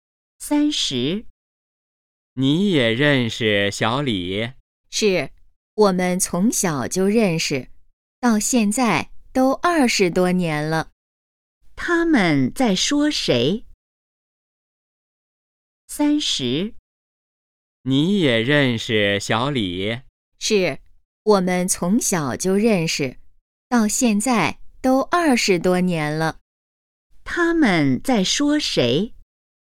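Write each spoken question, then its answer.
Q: 他们在说谁?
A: 小李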